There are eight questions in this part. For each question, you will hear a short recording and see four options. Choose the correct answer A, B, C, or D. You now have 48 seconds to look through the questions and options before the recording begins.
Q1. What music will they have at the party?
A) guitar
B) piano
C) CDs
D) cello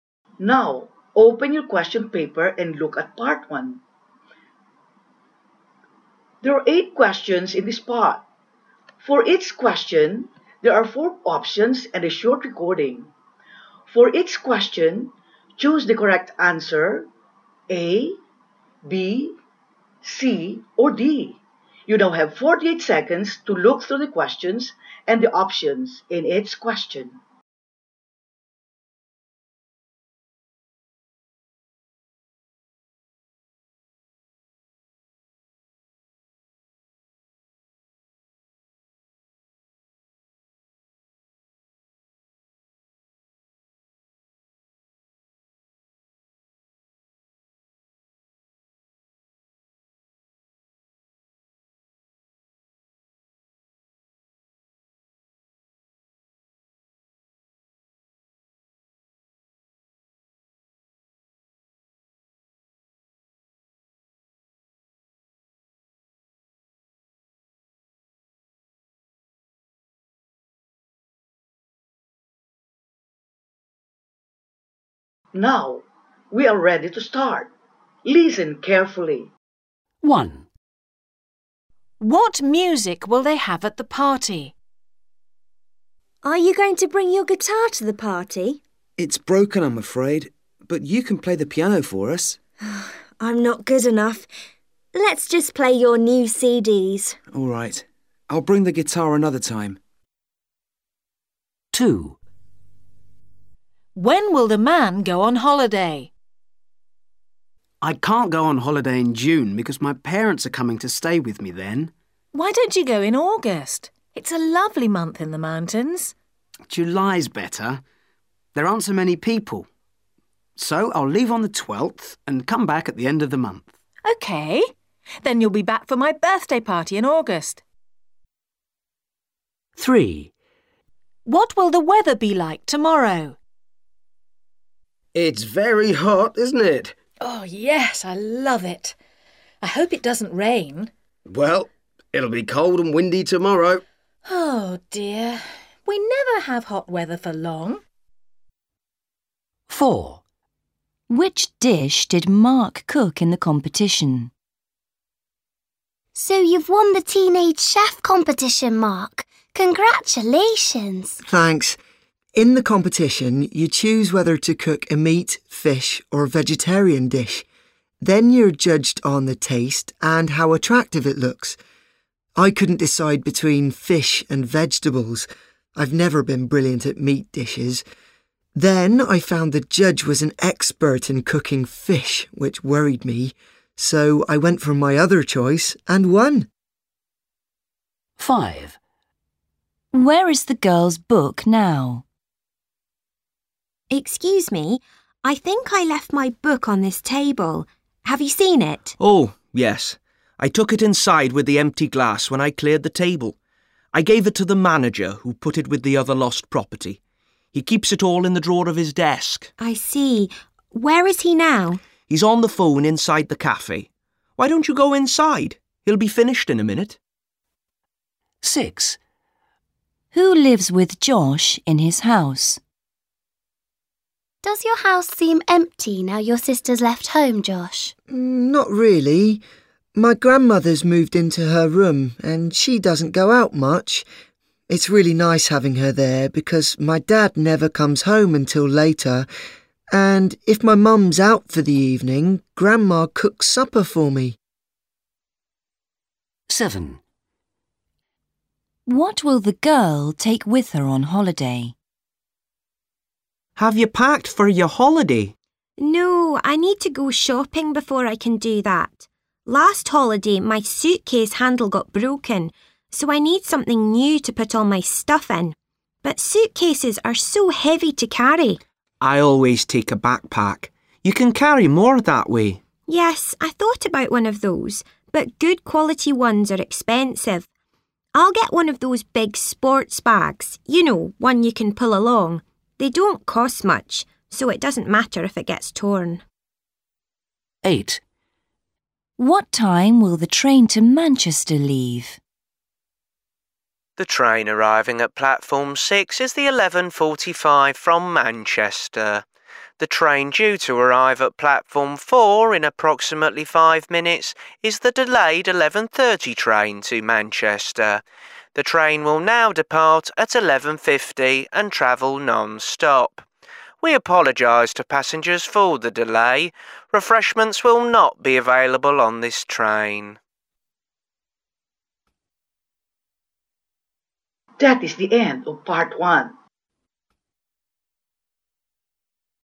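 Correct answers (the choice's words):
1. CDs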